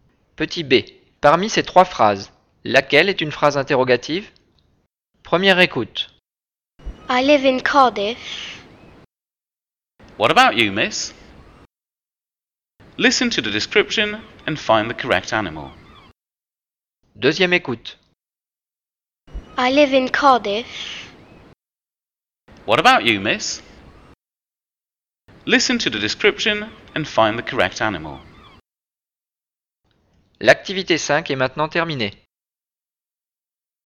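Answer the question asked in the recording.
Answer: What about you, miss?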